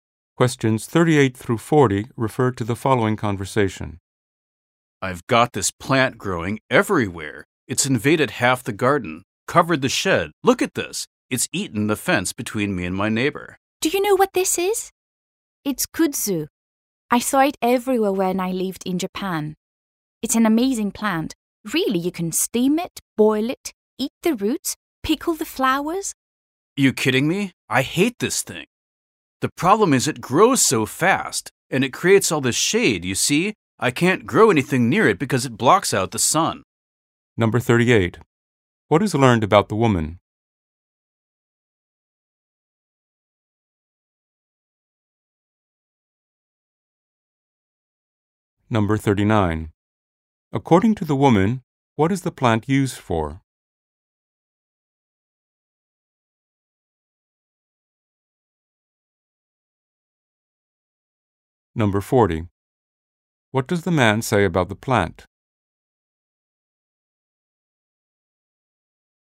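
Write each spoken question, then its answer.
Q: What is learned about the woman?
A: She lived in Japan

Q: According to the woman, what is the plant used for?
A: Food

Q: What does the man say about the plant?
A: It grows fast and blocks out the sun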